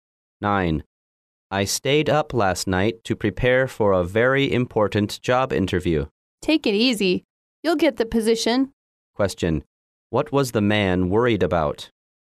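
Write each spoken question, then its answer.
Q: What was the man worried about?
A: A very important job interview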